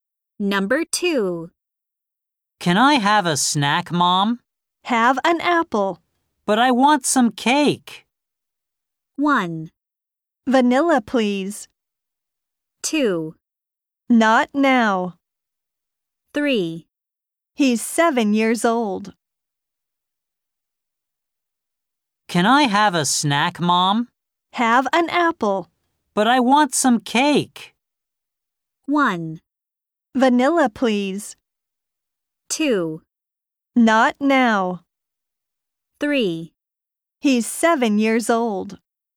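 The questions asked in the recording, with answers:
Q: But I want some cake.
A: 2: Not now.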